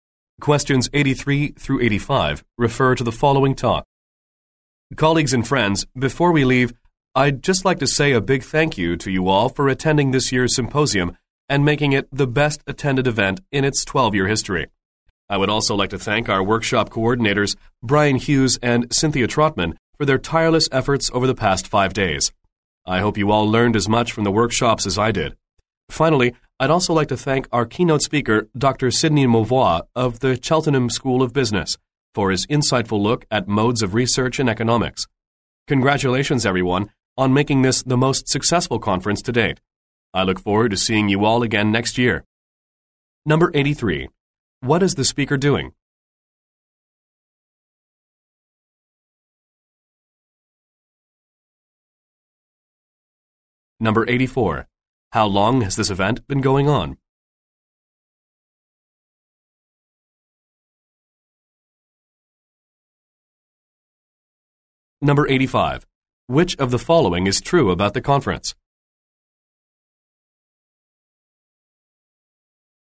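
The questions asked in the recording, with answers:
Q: What is the speaker doing?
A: Thanking people at the close of a symposium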